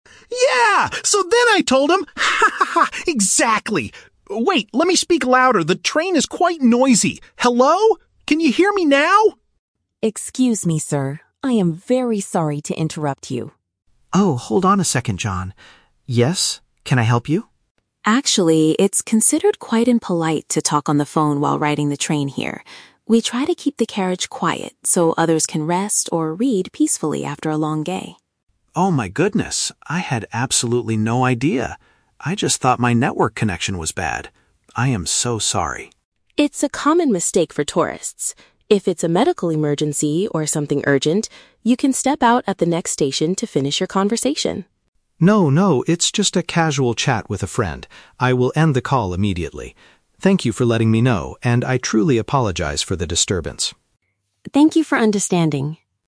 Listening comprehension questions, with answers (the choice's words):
Listen to the conversation between a tourist and a local commuter. Choose the correct answer (A, B, or C) for each question.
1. Why does the local commuter interrupt the tourist?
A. Because the tourist is asking for directions to the next station.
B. Because the tourist's phone is playing very loud music.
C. Because the tourist's behavior is bothering other passengers.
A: Because the tourist's behavior is bothering other passengers.

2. What is the tourist's initial reason for raising his voice?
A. He believed that his phone signal was weak.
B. He was arguing with the person on the other end of the line.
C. He wanted to wake up the sleeping passengers on purpose.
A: He believed that his phone signal was weak.

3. How does the tourist resolve the situation?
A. He gets off the train at the next stop to continue chatting.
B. He ends the conversation because it is not an urgent matter.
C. He lowers his voice to a whisper to finish the phone call.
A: He ends the conversation because it is not an urgent matter.

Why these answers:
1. Yuki says it is "impolite to talk on the phone" because people want to "keep the carriage quiet so others can rest" (meaning his behavior is bothering them). Option (A) is a trap; the "next station" is mentioned later as a place to step out, not because he asked for directions. Option (B) is a trap; he is being loud, but he is talking, not playing music.
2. Alex explains his loudness by saying, "I just thought my network connection was bad" (phone signal was weak). Option (B) is a trap; he was laughing ("haha") and having a "casual chat", not arguing. Option (C) is a trap; Yuki mentions passengers trying to "rest", but Alex didn't want to wake them up on purpose.
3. Alex says it's "just a casual chat" (not an urgent matter) and promises to "end the call immediately." Option (A) is a trap; Yuki suggests stepping out if it is an emergency, but Alex declines this option. Option (C) is a plausible reaction in real life, but Alex explicitly says he will end the call.

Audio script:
Alex: Yeah, so then I told him... Wait, let me speak louder, the train is quite noisy. HELLO? Can you hear me now?
Yuki: Excuse me, sir. I am very sorry to interrupt you.
Alex: Oh, hold on a second, John. Yes? Can I help you?
Yuki: Actually, it's considered quite impolite to talk on the phone while riding the train here. We try to keep the carriage quiet so others can rest or read peacefully after a long day.
Alex: Oh my goodness, I had absolutely no idea! I just thought my network connection was bad. I am so sorry.
Yuki: It's a common mistake for tourists. If it's a medical emergency or something urgent, you can step out at the next station to finish your conversation.
Alex: No, no, it's just a casual chat with a friend. I will end the call immediately. Thank you for letting me know, and I truly apologize for the disturbance.